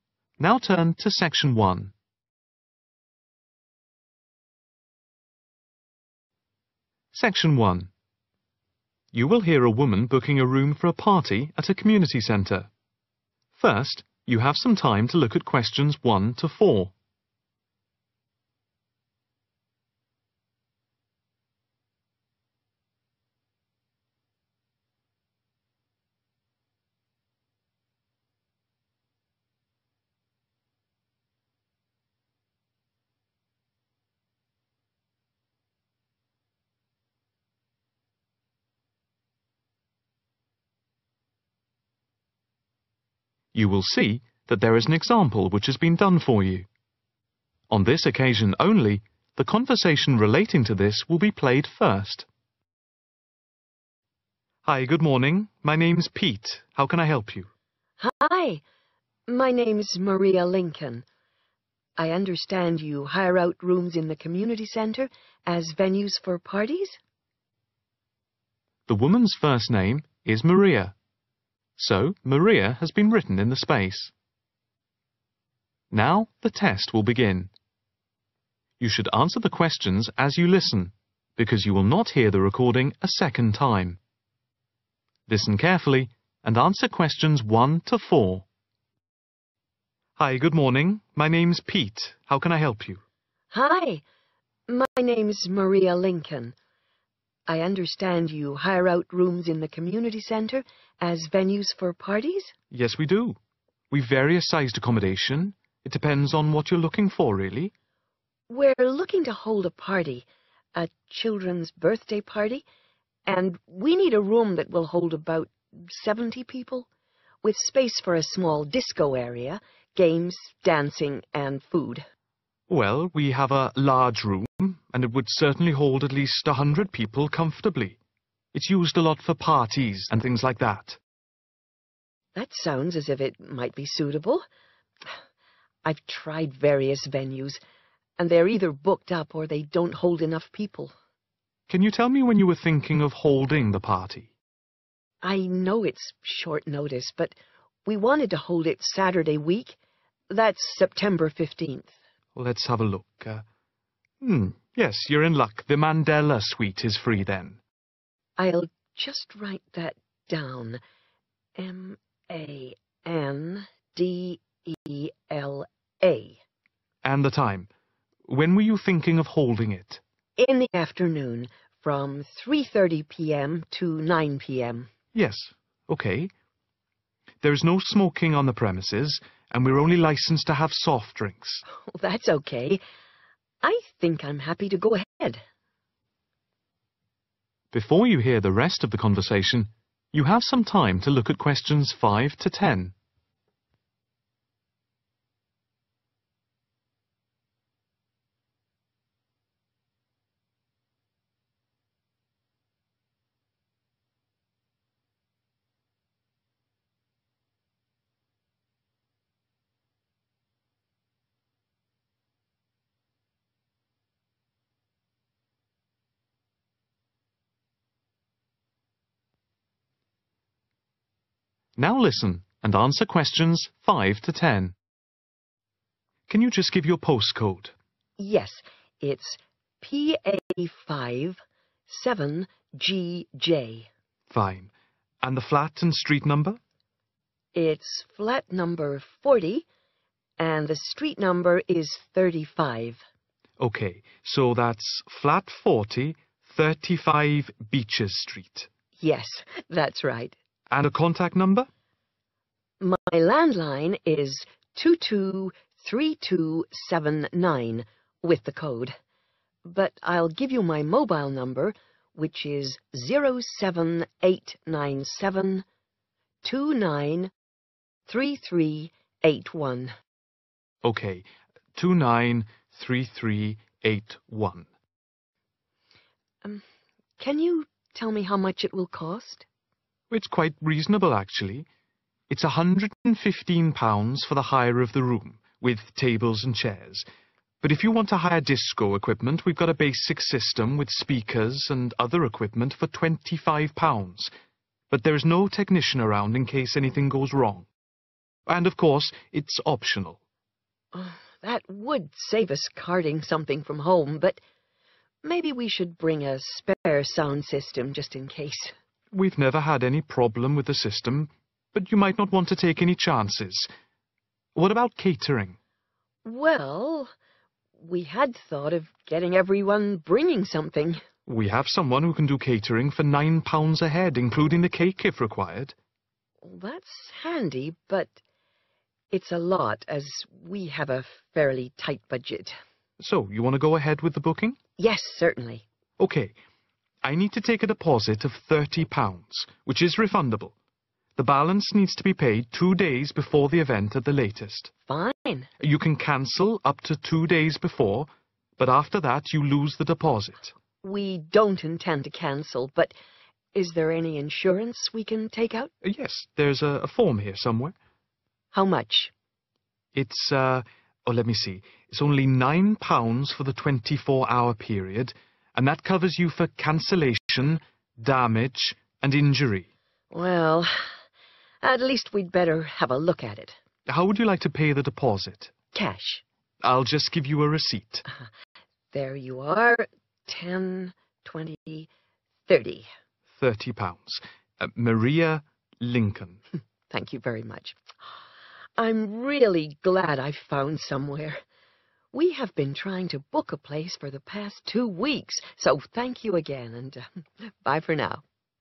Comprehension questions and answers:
Complete the notes below. Write NO MORE THAN THREE WORDS AND/OR NUMBERS for each answer.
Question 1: Number of people: approximately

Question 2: Date of party:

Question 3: Name of room: The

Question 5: Postcode:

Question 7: Mobile: 07897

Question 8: Cost of room hire: £115 with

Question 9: Deposit: £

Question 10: Insurance: £9 for 24 hours. Covers cancellation,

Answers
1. 70
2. September 15th / 15th September
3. Mandela Suite
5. PA5 7GJ
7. 29 33 81
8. tables and chairs
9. 30 / thirty
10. damage and injury